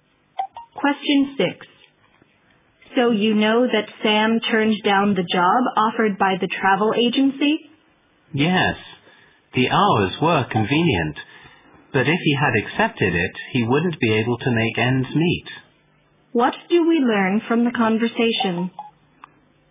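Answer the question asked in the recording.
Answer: Sam turned down the job because the pay was too low to live on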